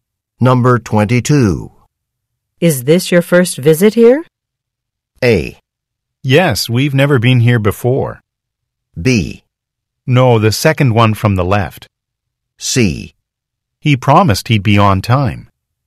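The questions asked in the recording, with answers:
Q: Is this your first visit here?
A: A: Yes, we've never been here before.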